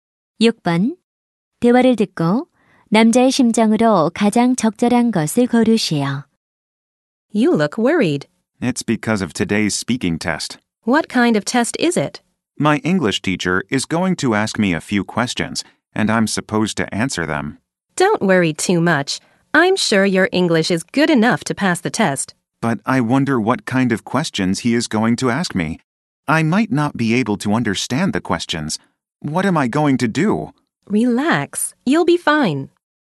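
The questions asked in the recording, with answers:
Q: 대화를 듣고 남자의 심정으로 가장 적절한 것을 고르시오.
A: 걱정스러움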